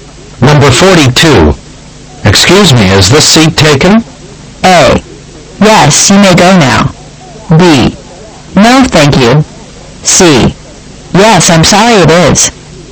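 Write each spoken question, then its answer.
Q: Excuse me, is this seat taken?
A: C: Yes, I'm sorry it is.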